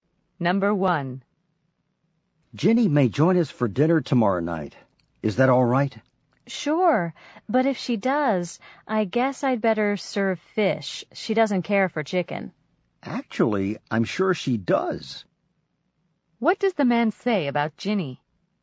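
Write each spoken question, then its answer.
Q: What does the man say about Jenny?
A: Jenny does like chicken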